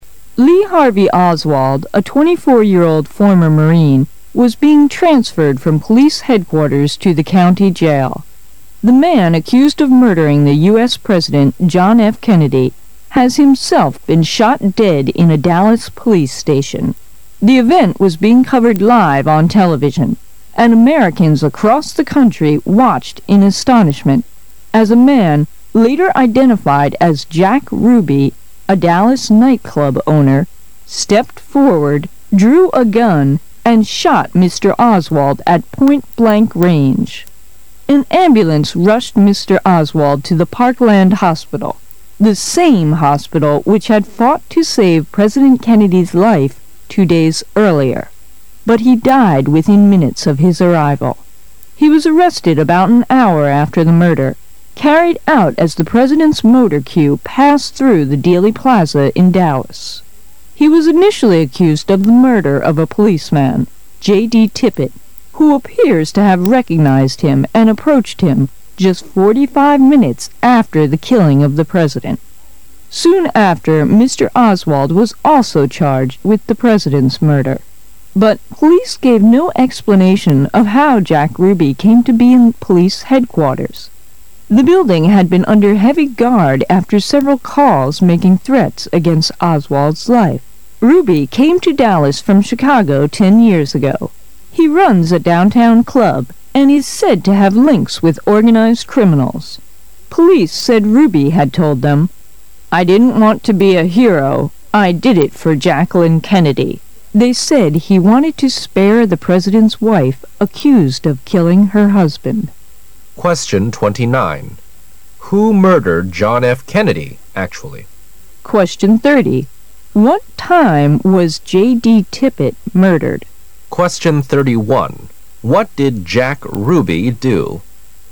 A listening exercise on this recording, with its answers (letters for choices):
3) What did Jack Ruby do?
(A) Policeman in police headquarters.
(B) Police in the President's motor queue.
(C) The boss of a downtown club.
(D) Just one of organized criminals.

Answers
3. C

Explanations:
文中提到He runs a down town club,他经营着一个市区俱乐部。可以得出答案C)。

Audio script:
[解析] 29-31 Lee Harvey Oswald, a 24-year-old former Marine, was being transferred from police headquarters to the county jail. The man accused of murdering the US President, John F. Kennedy, has himself been shot dead in a Dallas police station. The event was being covered live on television, and Americans across the country watched in astonishment as a man -- later identified as Jack Ruby, a Dallas nightclub owner -- stepped forward, drew a gun and shot Mr. Oswald at point-blank range. An ambulance rushed Mr. Oswald to the Parkland Hospital -- the same hospital which had fought to save President Kennedy's life two days earlier -- but he died within minutes of his arrival. He was arrested about an hour after the murder, carried out as the President's motor queue passed through the Dealey Plaza in Dallas. He was initially accused of the murder of a policeman, JD Tippit, who appears to have recognized him and approached him just 45 minutes after the killing of the President. Soon after, Mr. Oswald was also charged with the President's murder. But, police gave no explanation of how Jack Ruby came to be in the police headquarters. The building had been under heavy guard after several calls making threats against Oswald's life. Ruby came to Dallas from Chicago 10 years ago. He runs a downtown club, and is said to have links with organised criminals. Police said Ruby had told them, "1 didn't want to be a hero -- I did it for Jacqueline Kennedy. "They said he wanted to spare the president's wife accused of killing her husband. 29.Who murdered John F. Kennedy actually?